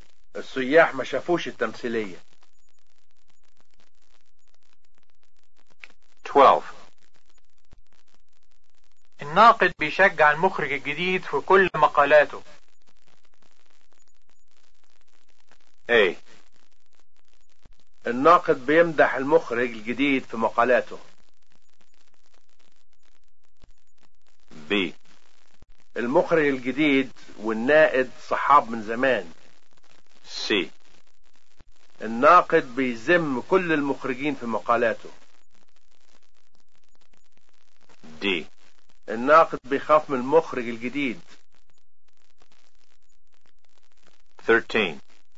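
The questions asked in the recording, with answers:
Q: الناقد بيشجع المخرج الجديد في كل مقالاته.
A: A: الناقد بيمدح المخرج الجديد في مقالاته.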